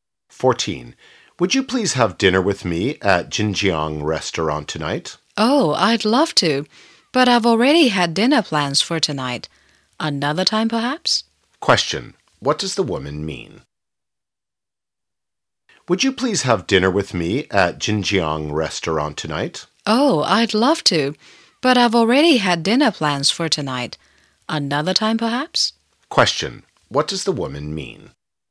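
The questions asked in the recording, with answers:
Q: What does the woman mean?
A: She can't go to dinner tonight because she already has plans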